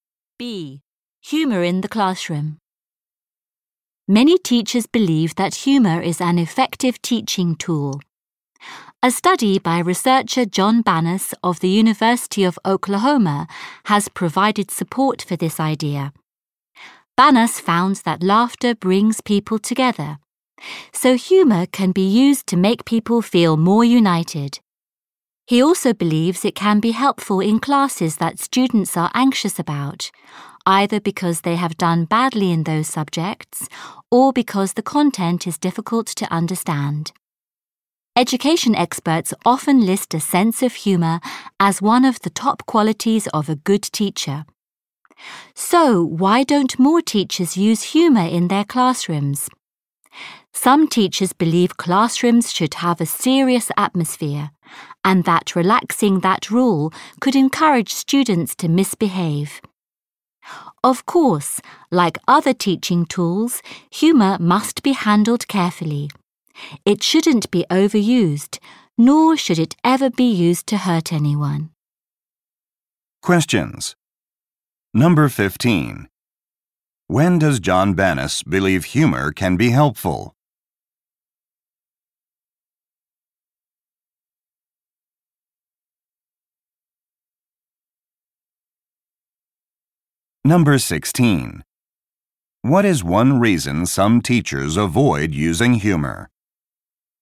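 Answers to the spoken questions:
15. In classes that students are anxious about.
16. They think it could encourage students to misbehave.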